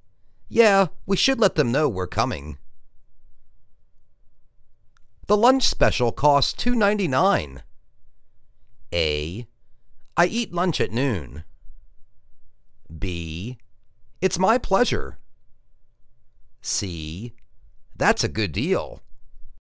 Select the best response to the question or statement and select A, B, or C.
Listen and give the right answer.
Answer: That's a good deal.